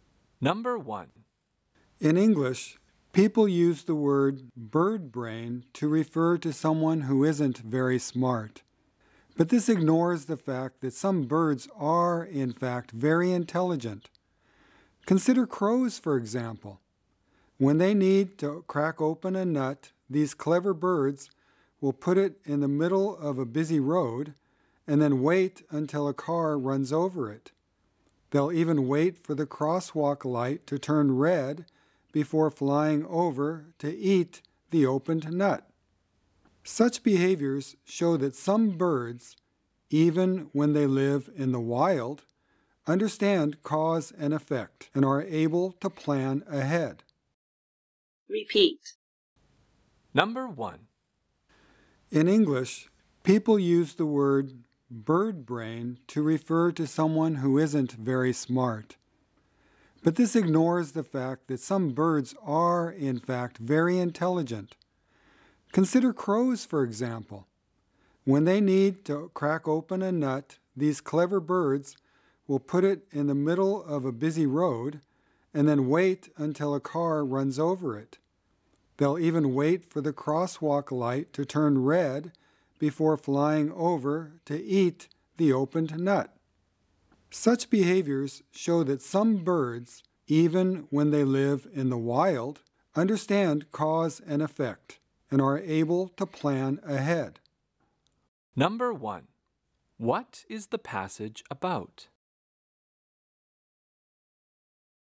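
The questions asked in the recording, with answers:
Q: what is the passage about?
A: Some birds, such as crows, are very intelligent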